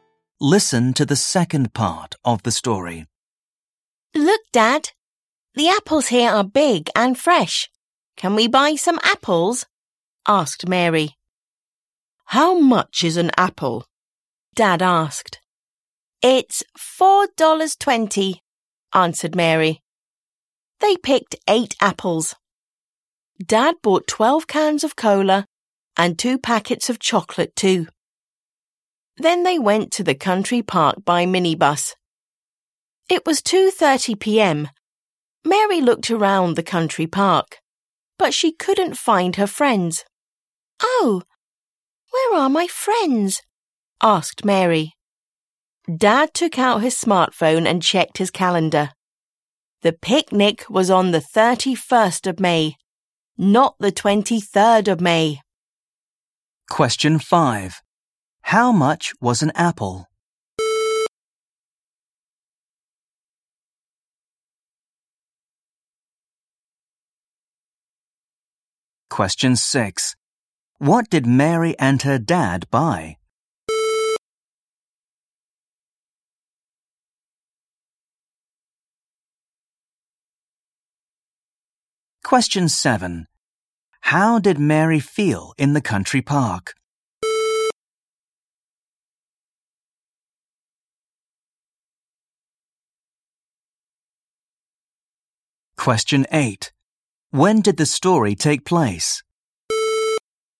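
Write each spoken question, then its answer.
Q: How much was an apple?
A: $4.20

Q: What did Mary and her dad buy?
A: 8 apples, 12 cans of cola and 2 packets of chocolate

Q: When did the story take place?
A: Sunday, 23rd of May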